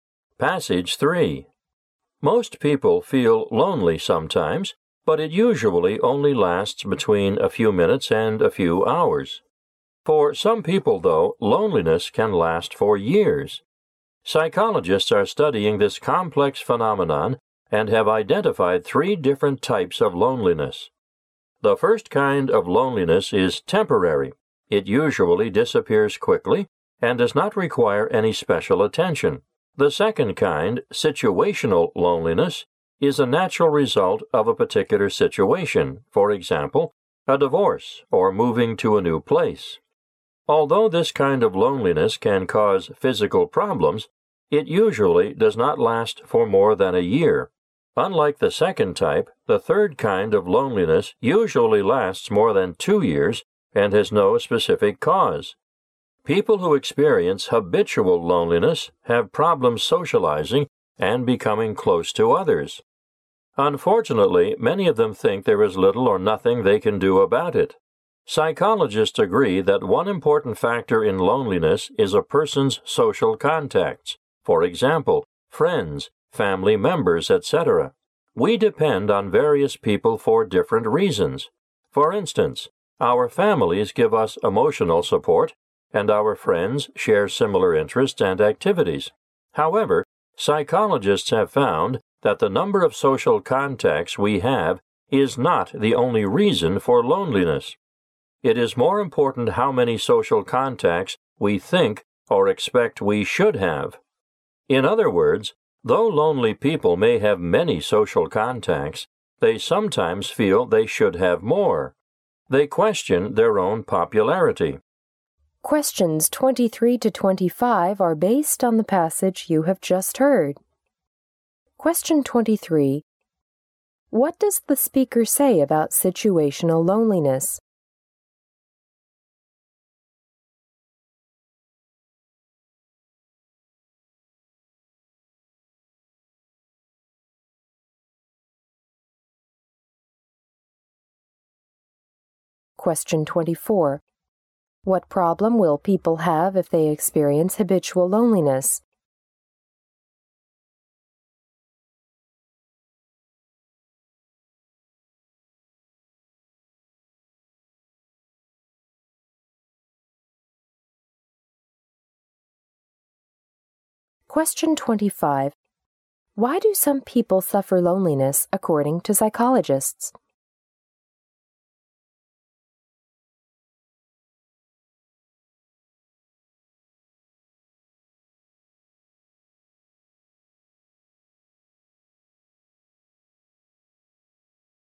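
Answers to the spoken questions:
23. It results from a particular situation and usually lasts no more than a year.
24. Difficulty socializing and becoming close to others
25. They think they should have more social contacts than they do.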